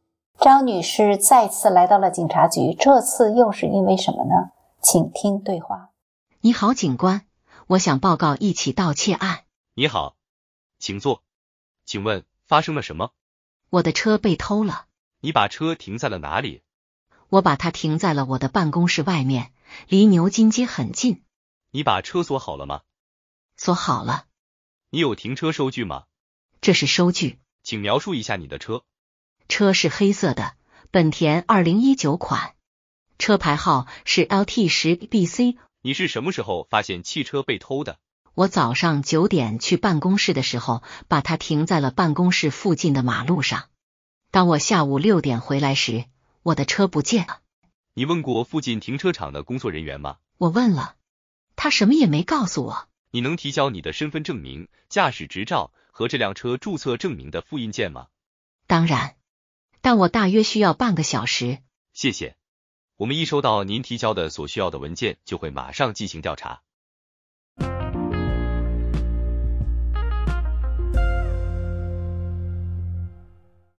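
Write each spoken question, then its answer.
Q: 张女士再次来到了警察局,这次又是因为什么呢?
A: 她的车被偷了,来报告盗窃案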